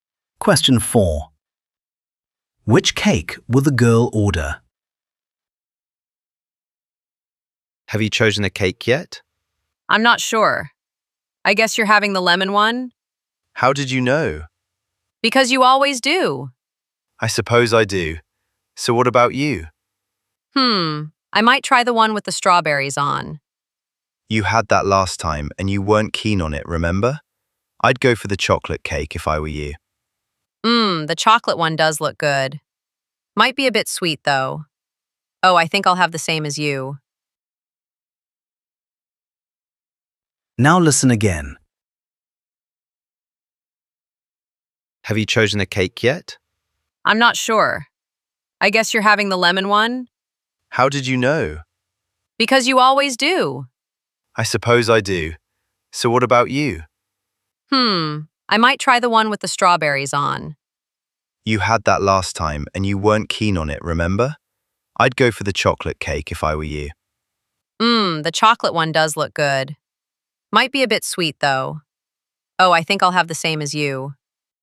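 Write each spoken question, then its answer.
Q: Which cake will the girl order?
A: The lemon cake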